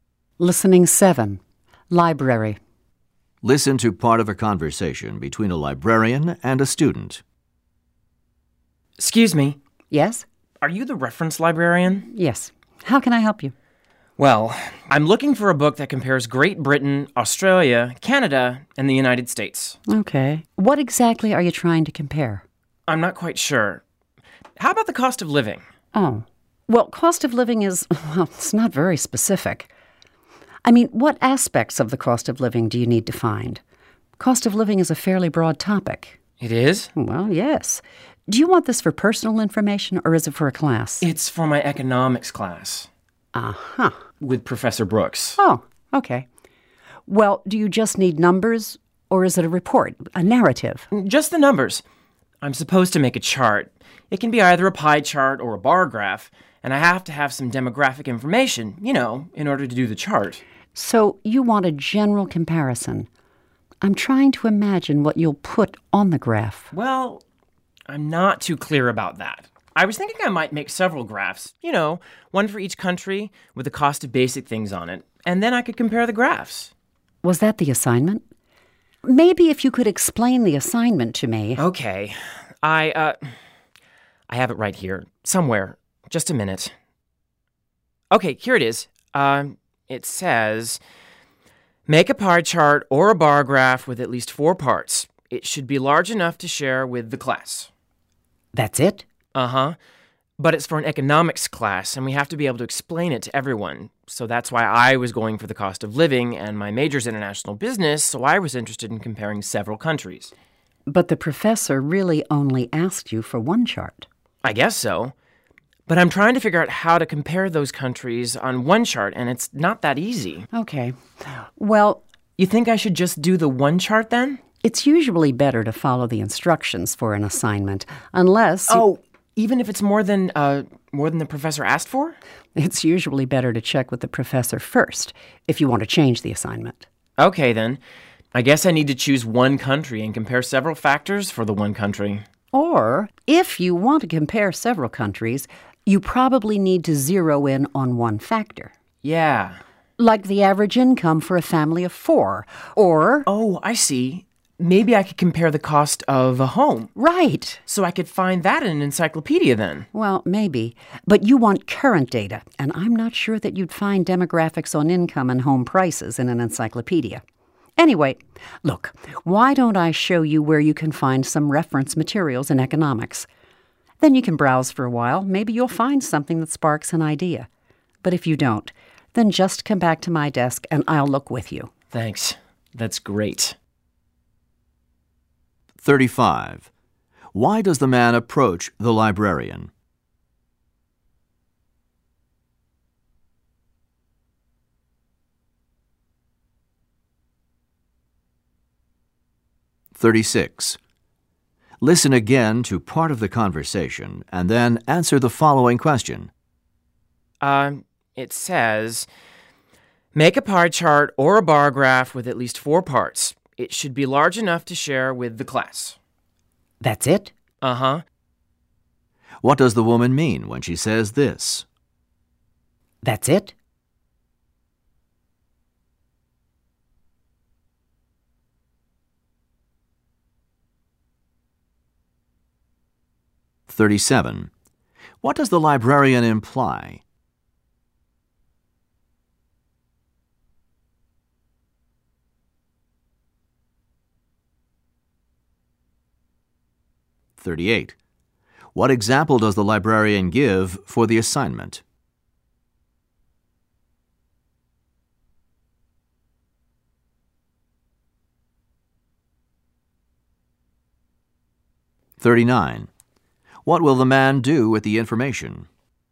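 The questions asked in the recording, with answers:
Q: Why does the man approach the librarian?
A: To find a book for his assignment comparing the cost of living in several countries

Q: What does the woman mean when she says this?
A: She is surprised the assignment is so simple

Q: What example does the librarian give for the assignment?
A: The average income for a family of four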